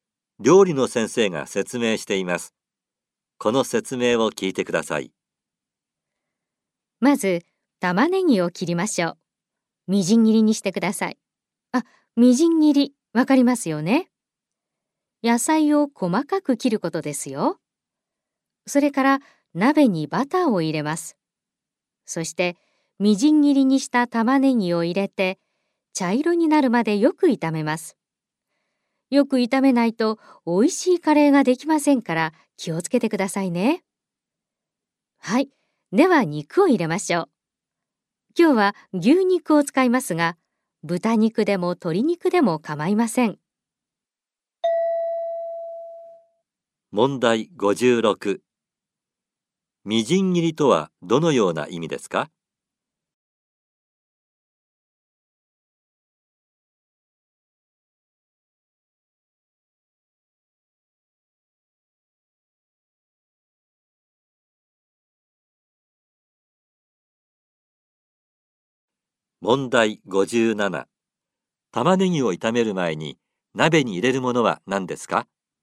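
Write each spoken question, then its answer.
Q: みじん切りとはどのような意味ですか?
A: 野菜を細かく切ること

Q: 玉ねぎを炒める前に鍋に入れるものは何ですか?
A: バター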